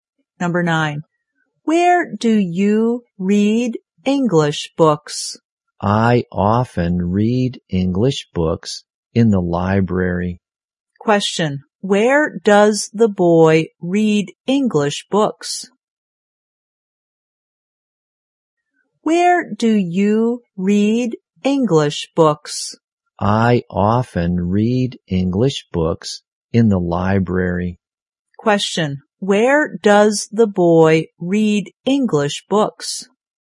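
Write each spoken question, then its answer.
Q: Where does the boy read English books?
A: In the library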